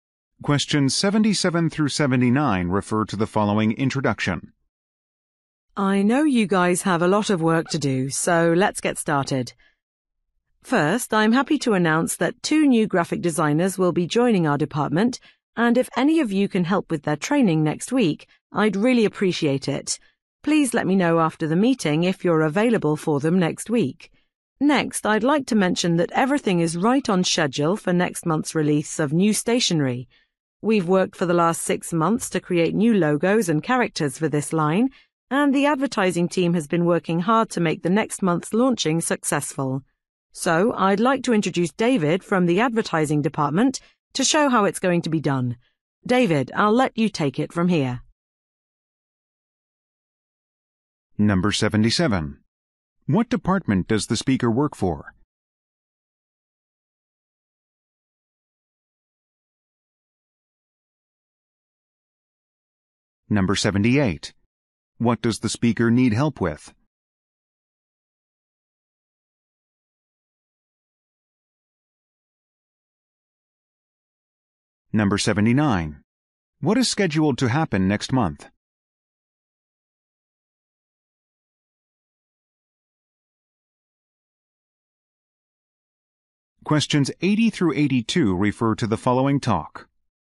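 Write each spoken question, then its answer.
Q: What does the speaker need help with?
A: Training new graphic designers

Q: What is scheduled to happen next month?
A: The release of a new stationery line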